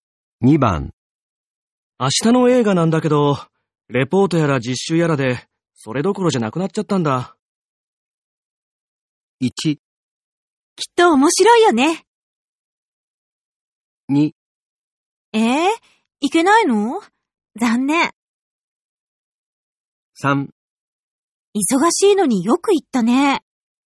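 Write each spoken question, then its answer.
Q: 明日の映画なんだけど、レポートやら実習やらでそれどころじゃなくなっちゃったんだ。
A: 2: いけないの?残念。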